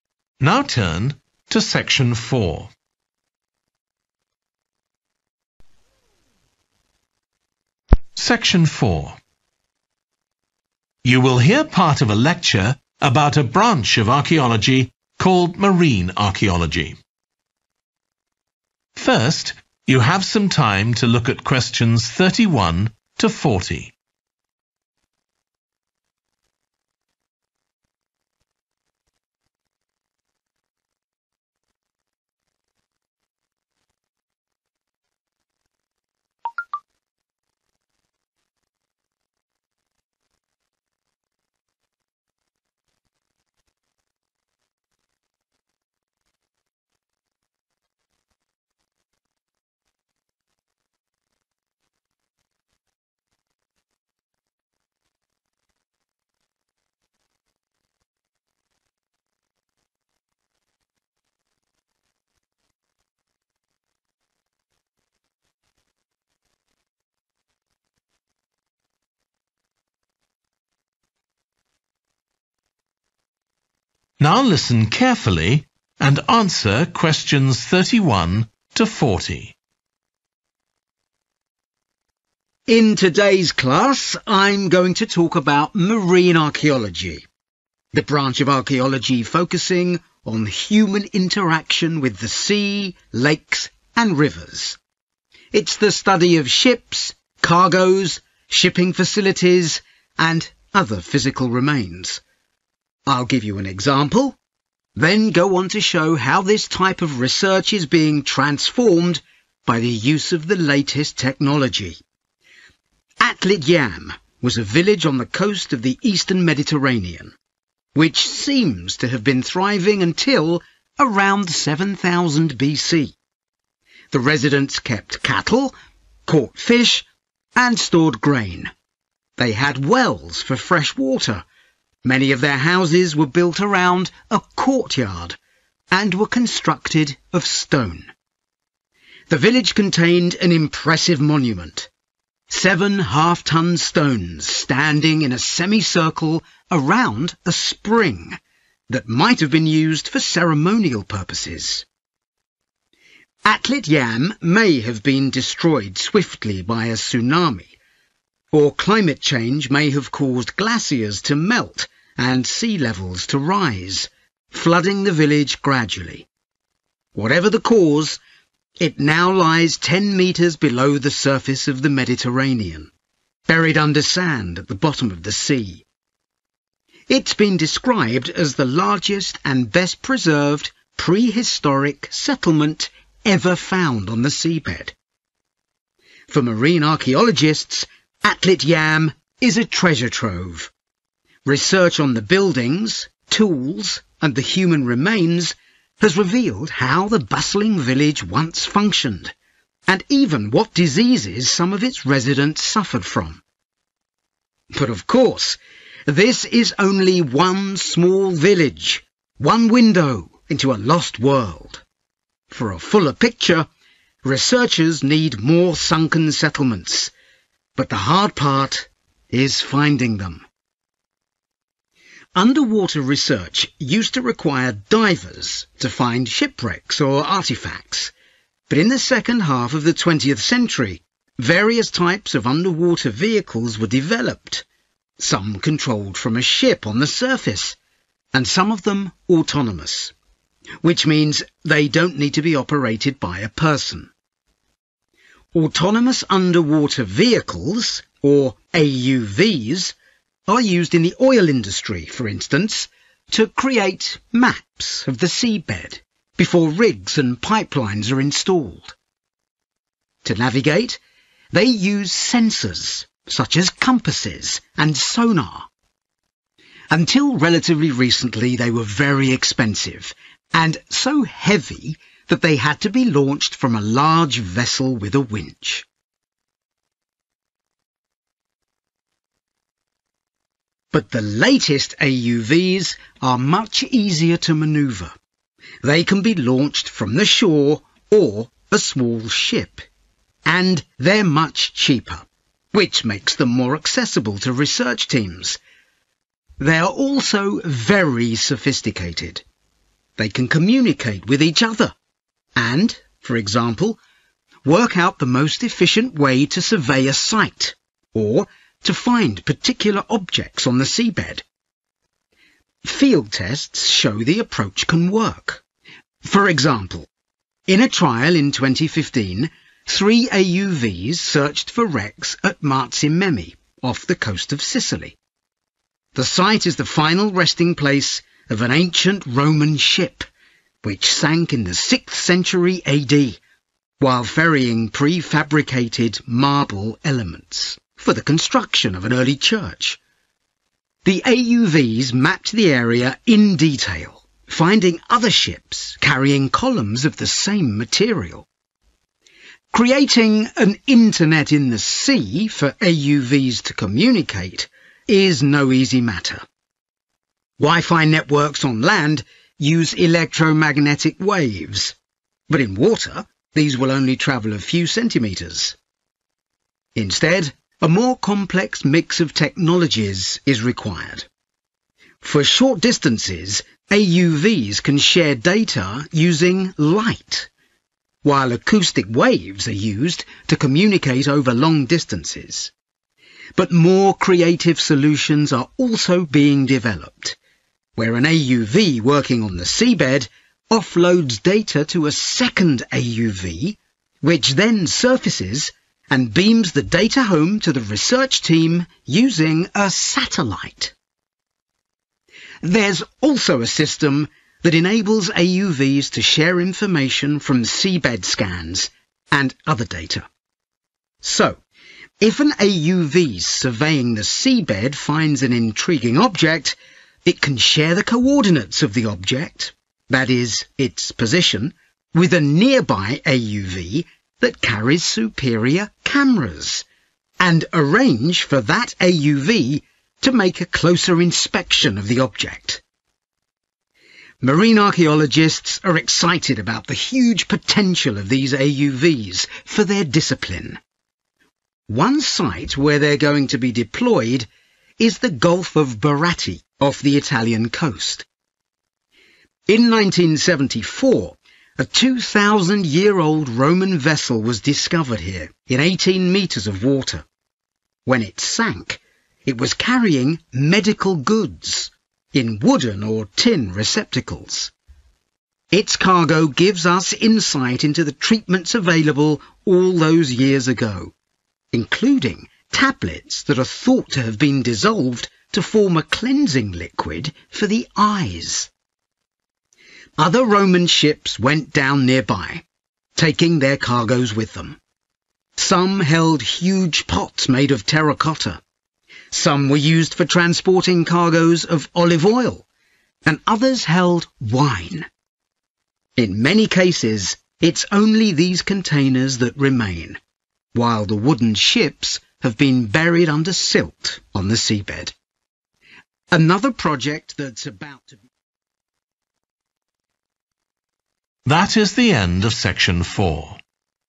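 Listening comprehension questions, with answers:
Complete the notes below.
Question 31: had a semicircle of large stones round a 31 ...............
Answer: spring

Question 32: research carried out into structures, 32 ............... and human remains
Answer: tools

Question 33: used in the oil industry, e.g. to make 33 ................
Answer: maps

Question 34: problems: they were expensive and 34 .................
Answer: heavy

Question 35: Marzamemi, Sicily: found ancient Roman ships carrying architectural elements made of 35 ...............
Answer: marble

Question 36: 36 ............... is used for short distance communication, acoustic waves for long distance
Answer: light

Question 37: AUV can send data to another AUV that has better 37 ...............,for example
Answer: cameras

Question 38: one carrying 38 ............... supplies;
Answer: medical

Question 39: tables may have been used for cleaning the 39 ...............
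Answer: eyes

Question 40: others carrying containers of olive oil or 40 ...............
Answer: wine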